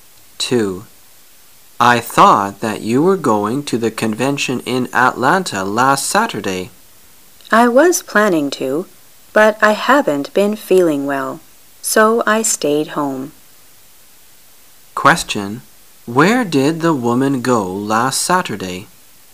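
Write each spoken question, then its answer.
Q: Question: Where did the woman go last Saturday?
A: She stayed home

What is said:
[解析] M: I thought that you were going to the convention in Atlanta last Saturday. W: I was planning to, but I haven't been feeling well, so I stayed home. Q: Where did the woman go last Saturday?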